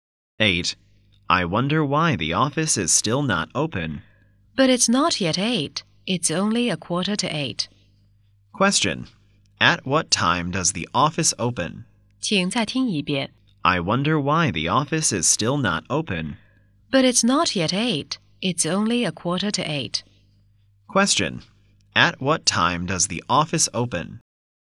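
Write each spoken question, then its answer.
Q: Question. At what time does the office open?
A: At eight o'clock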